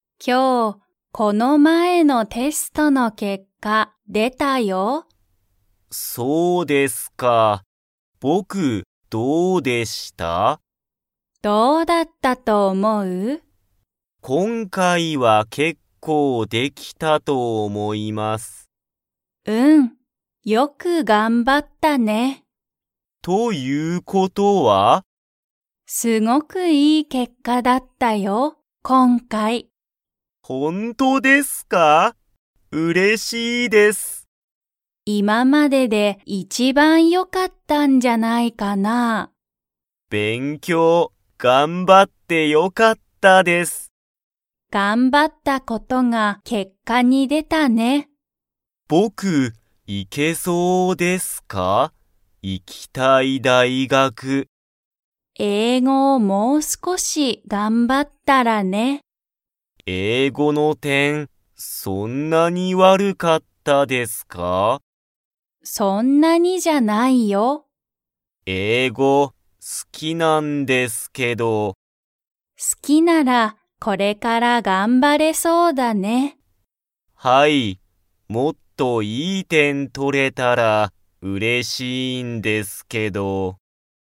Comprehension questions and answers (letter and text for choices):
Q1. ジュンの今回(こんかい)のテストは、すごくいい結果(けっか)でしたか?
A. はい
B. いいえ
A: A. はい

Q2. ジュンは、____をこれから頑張(がんば)れそうだ。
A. 英語(えいご)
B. 点(てん)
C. 大学(だいがく)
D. 結果(けっか)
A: A. 英語(えいご)

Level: Level 2